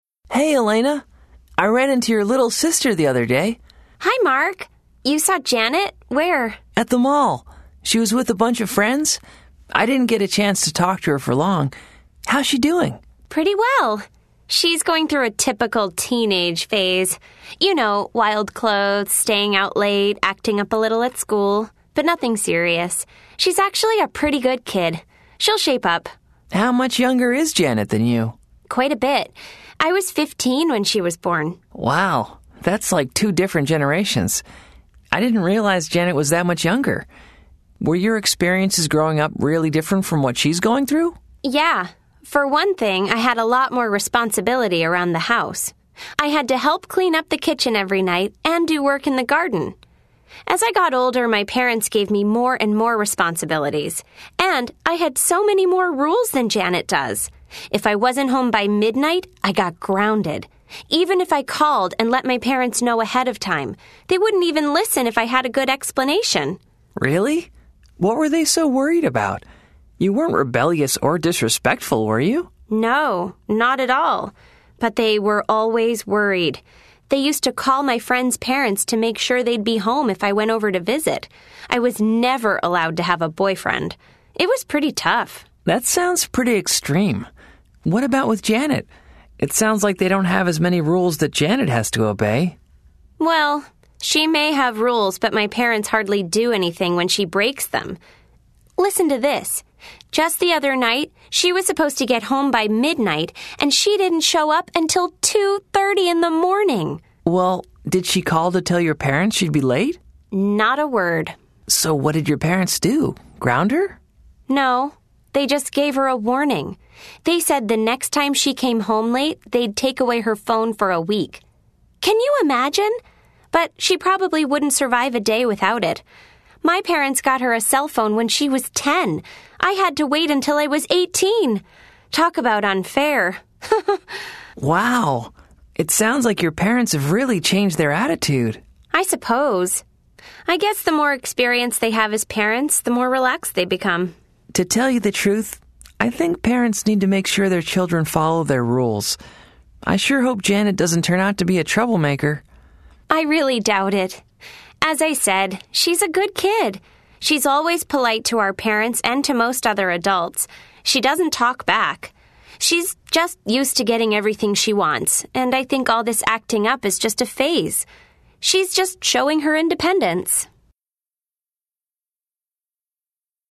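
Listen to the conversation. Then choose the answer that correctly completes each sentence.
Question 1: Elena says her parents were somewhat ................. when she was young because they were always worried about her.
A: strict

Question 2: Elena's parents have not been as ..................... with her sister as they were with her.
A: strict

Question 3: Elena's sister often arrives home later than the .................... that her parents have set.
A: curfew

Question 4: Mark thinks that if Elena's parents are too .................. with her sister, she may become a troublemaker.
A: lenient

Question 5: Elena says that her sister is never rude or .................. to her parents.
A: disrespectful

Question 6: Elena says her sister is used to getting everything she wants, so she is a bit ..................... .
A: spoiled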